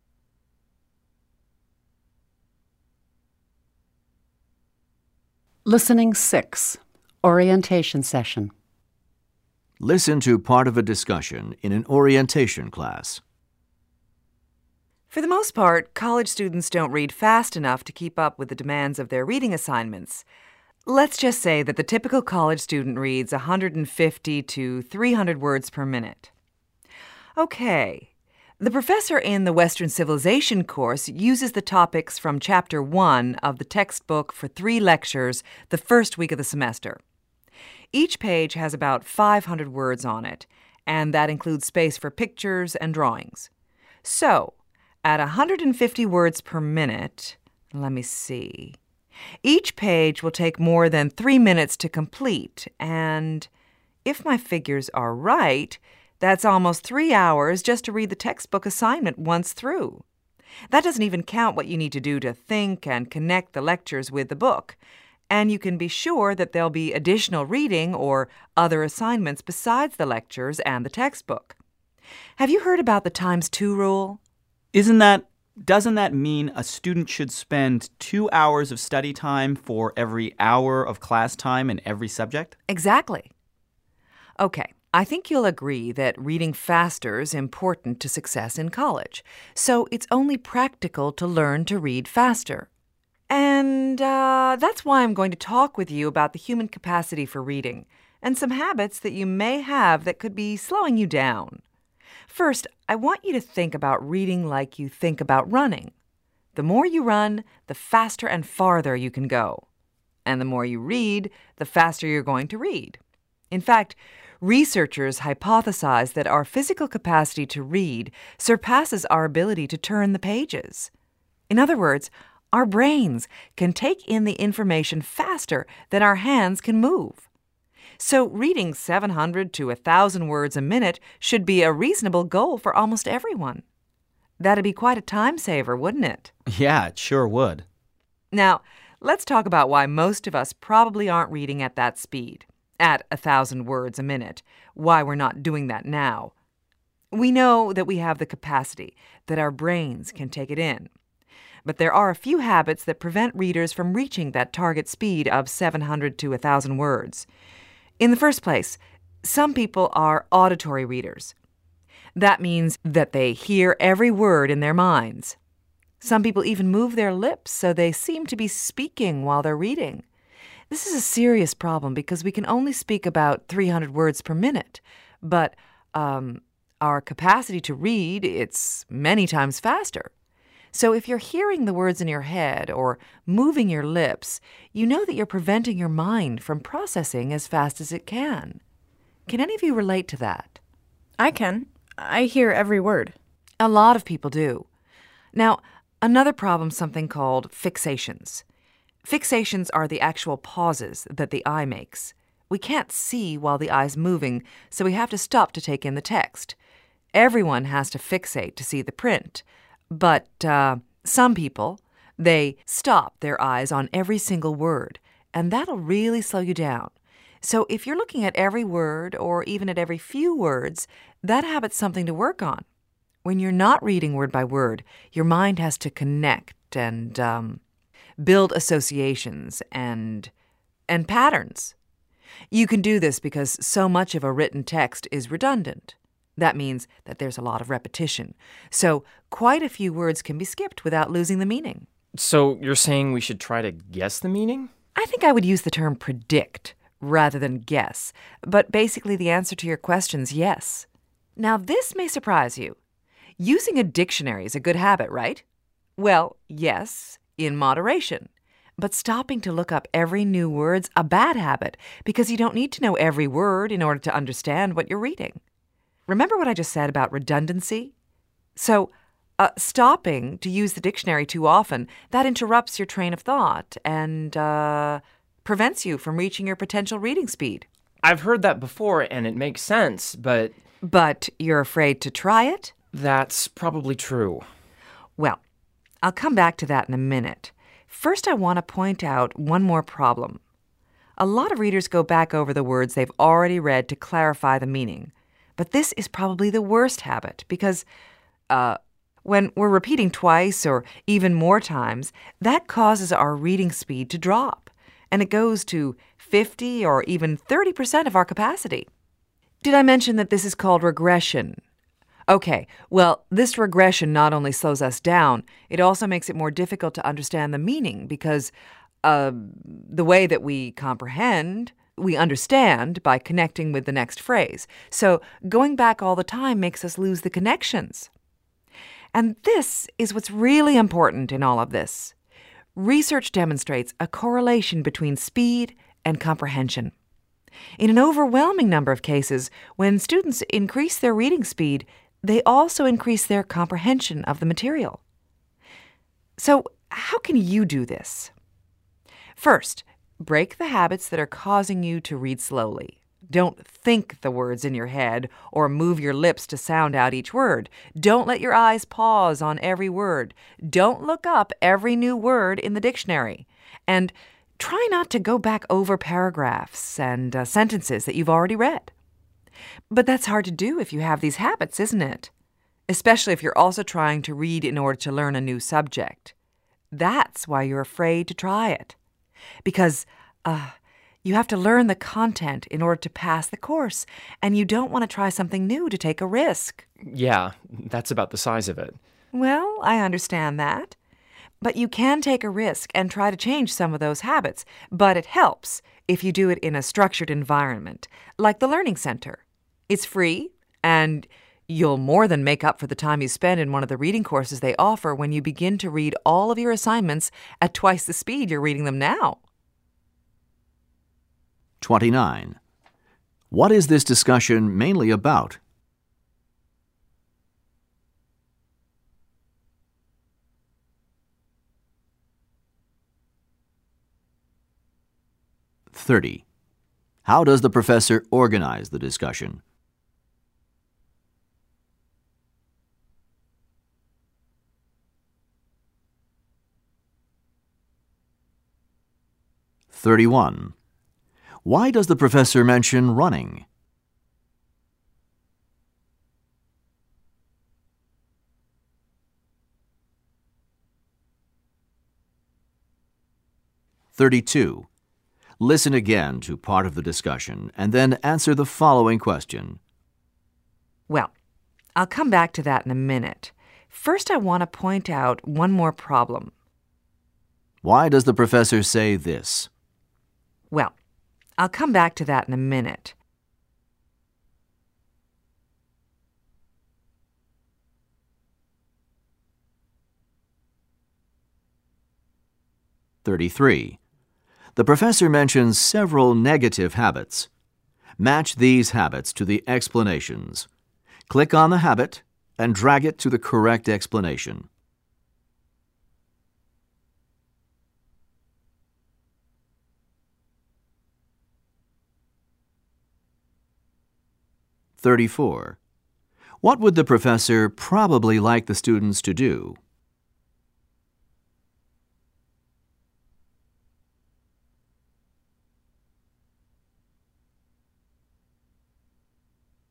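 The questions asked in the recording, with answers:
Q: What is this discussion mainly about?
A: How to read faster by breaking habits that slow reading

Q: Why does the professor mention running?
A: To compare it with reading: the more you practice, the faster you get

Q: What would the professor probably like the students to do?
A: Take a reading course at the Learning Center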